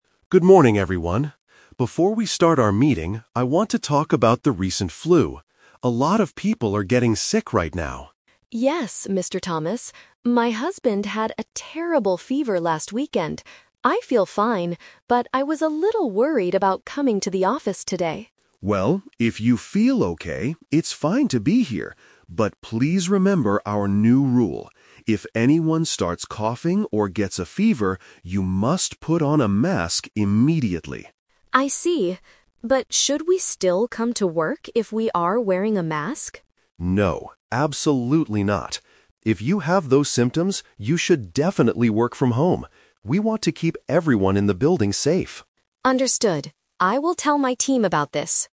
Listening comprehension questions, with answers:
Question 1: Why was the woman worried about coming to the office today?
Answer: Her husband was very sick recently.

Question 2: What must employees do right away if they start coughing?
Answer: Put on a mask.

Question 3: What does the manager want sick employees to do?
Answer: Stay at their house and work from there.

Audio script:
Manager: Good morning, everyone. Before we start our meeting, I want to talk about the recent flu. A lot of people are getting sick right now.
Employee: Yes, Mr. Thomas. My husband had a terrible fever last weekend. I feel fine, but I was a little worried about coming to the office today.
Manager: Well, if you feel okay, it's fine to be here. But please remember our new rule: if anyone starts coughing or gets a fever, you must put on a mask immediately.
Employee: I see. But should we still come to work if we are wearing a mask?
Manager: No, absolutely not. If you have those symptoms, you should definitely work from home. We want to keep everyone in the building safe.